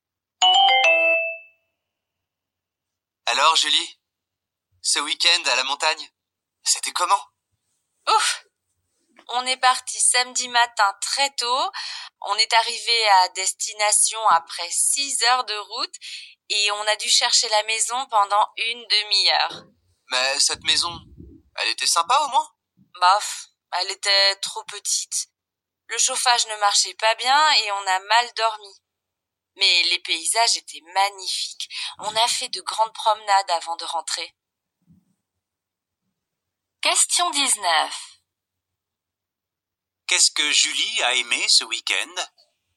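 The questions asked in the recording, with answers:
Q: Qu'est-ce que Julie a aimé ce week-end?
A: Les paysages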